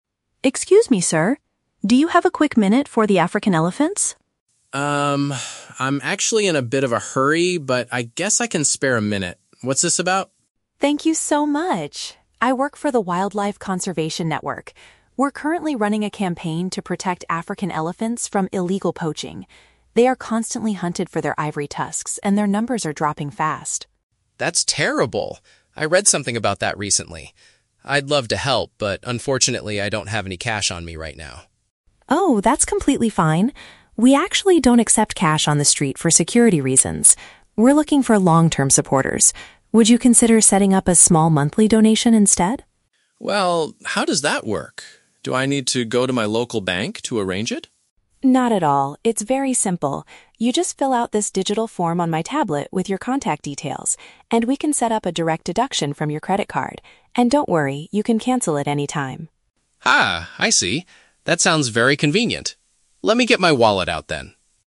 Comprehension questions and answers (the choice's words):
Listen to a conversation between a street fundraiser and a passerby, and choose the best answer (A, B, or C) for each question.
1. What does the fundraiser primarily want the passerby to do?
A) Give her some cash immediately to help the animals.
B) Agree to make a regular financial contribution.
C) Join the conservation network as a wildlife volunteer.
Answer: Agree to make a regular financial contribution.

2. Why did the man initially think he could not help the charity?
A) He did not carry any paper money with him.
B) He was in too much of a hurry to stop and talk.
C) He did not believe the campaign was legitimate.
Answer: He did not carry any paper money with him.

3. How will the man's donation be processed?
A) He will have to visit his bank to transfer the money.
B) He will pay using his mobile banking application.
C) The money will be automatically taken from his card.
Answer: The money will be automatically taken from his card.

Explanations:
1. The fundraiser asks the man if he would consider "setting up a small monthly donation." Option B paraphrases this as a "regular financial contribution."
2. The man says, "I'd love to help, but unfortunately, I don't have any cash on me right now." Option A paraphrases this as not carrying "paper money."
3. The fundraiser explains that they will set up a "direct deduction from your credit card." Option C paraphrases this as the money being "automatically taken from his card."

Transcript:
Fundraiser: Excuse me, sir! Do you have a quick minute for the African elephants?
Passerby: Um, I'm actually in a bit of a hurry, but I guess I can spare a minute. What's this about?
Fundraiser: Thank you so much! I work for the Wildlife Conservation Network. We're currently running a campaign to protect African elephants from illegal poaching. They are constantly hunted for their ivory tusks, and their numbers are dropping fast.
Passerby: That's terrible. I read something about that recently. I'd love to help, but unfortunately, I don't have any cash on me right now.
Fundraiser: Oh, that's completely fine. We actually don't accept cash on the street for security reasons. We're looking for long-term supporters. Would you consider setting up a small monthly donation instead?
Passerby: Well, how does that work? Do I need to go to my local bank to arrange it?
Fundraiser: Not at all, it's very simple. You just fill out this digital form on my tablet with your contact details, and we can set up a direct deduction from your credit card. And don't worry, you can cancel it anytime.
Passerby: Ah, I see. That sounds very convenient. Let me get my wallet out then.